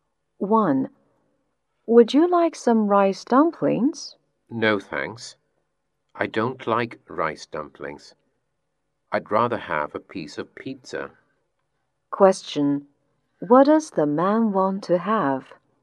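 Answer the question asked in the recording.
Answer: A piece of pizza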